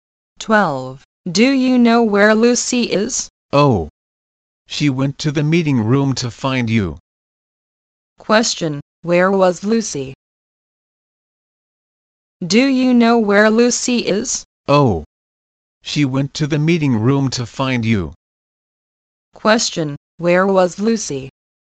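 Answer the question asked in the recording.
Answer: In the meeting room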